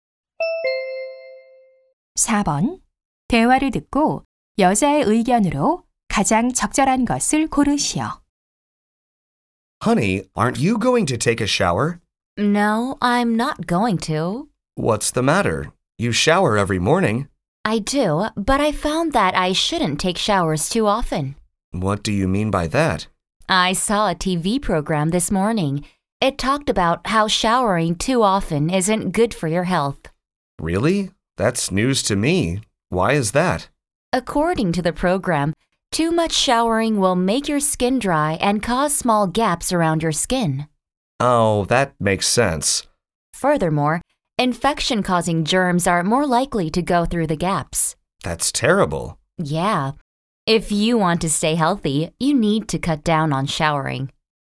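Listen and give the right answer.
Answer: 샤워를 너무 자주 하면 건강에 좋지 않다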